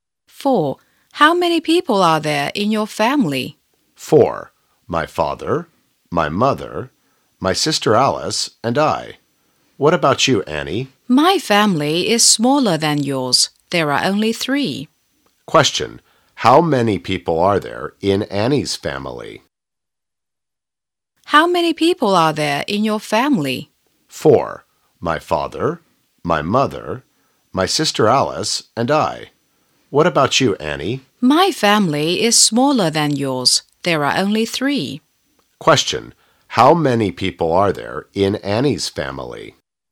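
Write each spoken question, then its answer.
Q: How many people are there in Annie's family?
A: Three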